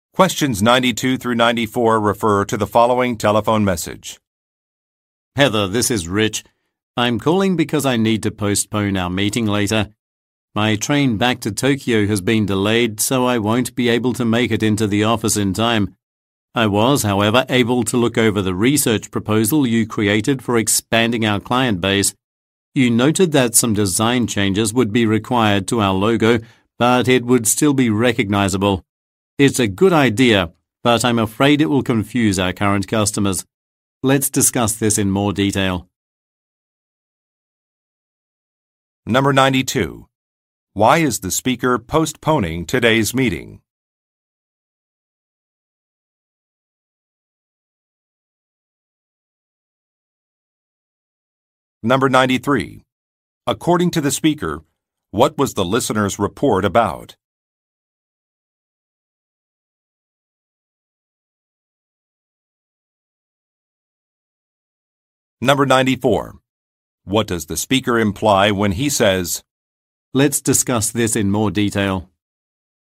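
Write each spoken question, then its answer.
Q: Why is the speaker postponing today's meeting?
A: His train back to Tokyo has been delayed

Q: According to the speaker, what was the listener's report about?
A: Expanding the client base (a research proposal)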